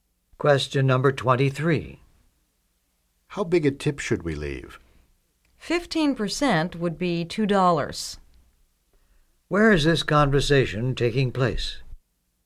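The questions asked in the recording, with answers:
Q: Where is this conversation taking place?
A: In a restaurant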